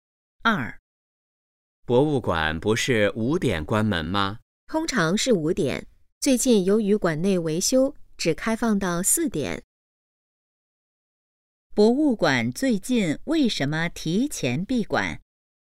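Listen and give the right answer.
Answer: 馆内维修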